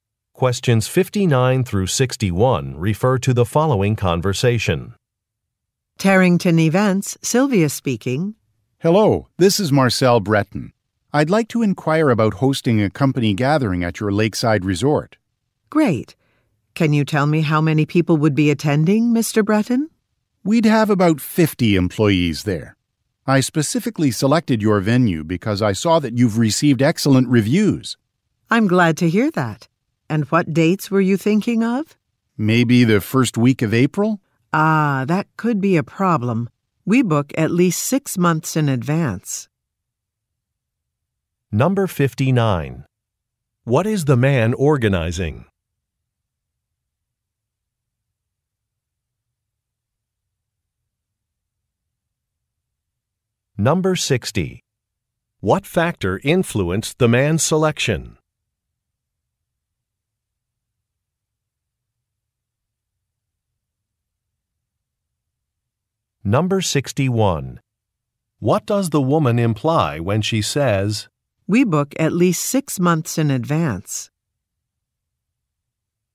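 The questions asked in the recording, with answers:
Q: What is the man organizing?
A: A company gathering

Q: What factor influenced the man's selection?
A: Excellent reviews

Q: What does the woman imply when she says,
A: The first week of April may not be available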